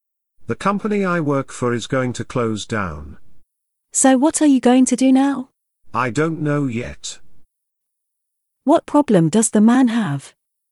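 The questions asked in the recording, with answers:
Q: What problem does the man have?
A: His company is closing down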